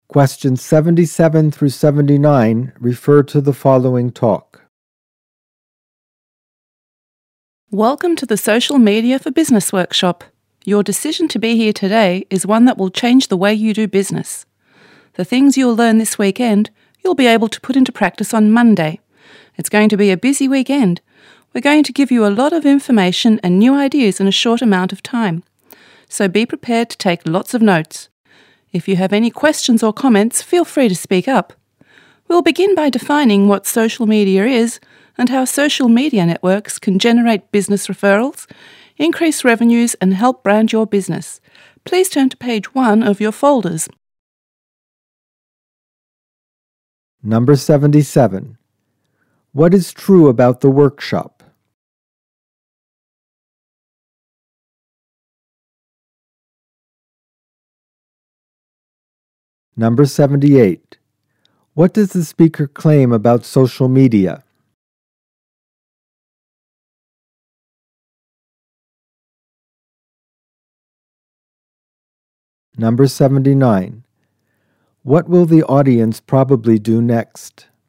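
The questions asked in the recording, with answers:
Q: What does the speaker claim about social media?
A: It can generate referrals, increase revenues and help brand a business

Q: What will the audience probably do next?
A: Turn to page 1 of their folders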